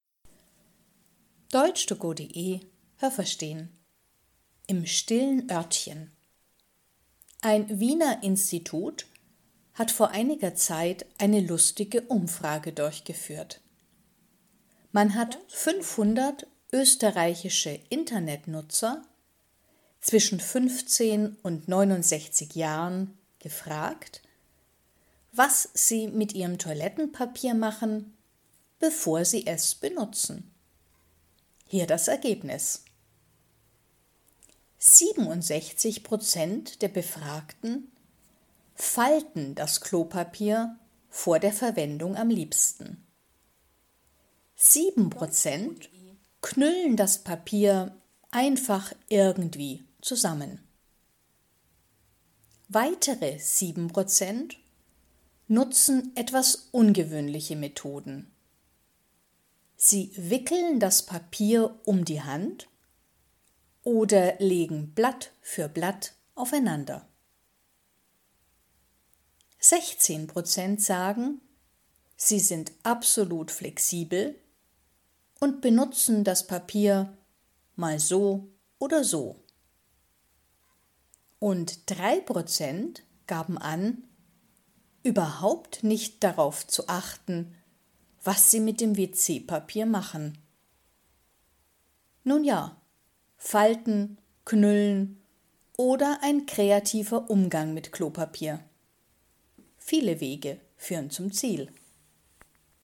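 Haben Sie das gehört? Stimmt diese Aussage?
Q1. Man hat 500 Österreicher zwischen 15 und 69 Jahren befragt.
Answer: Richtig

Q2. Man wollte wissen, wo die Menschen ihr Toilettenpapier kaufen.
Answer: Falsch

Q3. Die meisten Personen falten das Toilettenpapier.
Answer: Richtig

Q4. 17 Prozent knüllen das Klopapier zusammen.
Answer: Falsch

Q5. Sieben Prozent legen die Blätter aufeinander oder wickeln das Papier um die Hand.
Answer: Richtig

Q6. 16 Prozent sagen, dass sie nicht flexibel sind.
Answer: Falsch

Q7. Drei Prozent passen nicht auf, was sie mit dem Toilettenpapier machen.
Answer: Richtig

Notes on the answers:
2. Man wollte wissen, was die Menschen mit ihrem Toilettenpapier machen, bevor sie es benutzen.
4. Das machen sieben Prozent.
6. 16 Prozent sind absolut flexibel und benutzen das Toilettenpapier mal so oder so.

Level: Hörtexte A (einfach)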